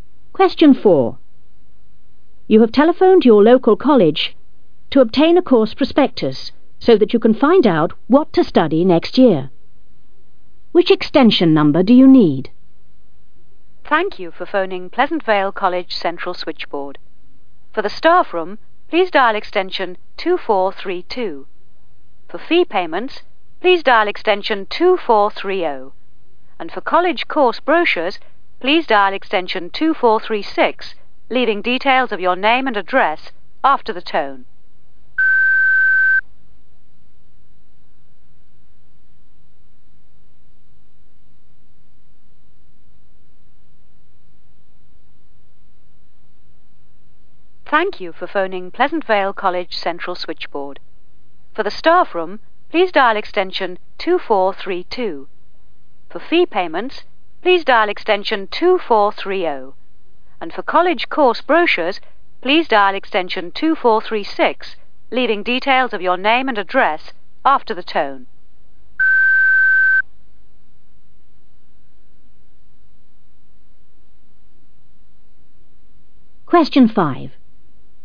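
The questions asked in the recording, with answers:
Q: Which extension number do you need?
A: 2436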